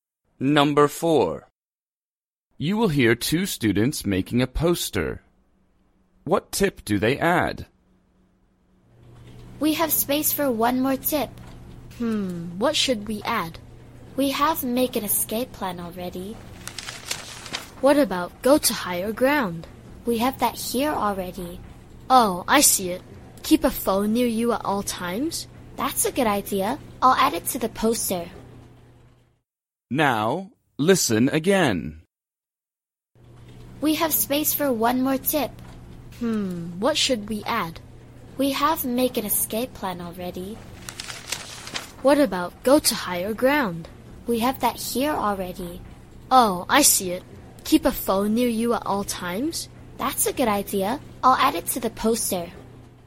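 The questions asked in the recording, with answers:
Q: What tip do they add?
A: Keep a phone near you at all times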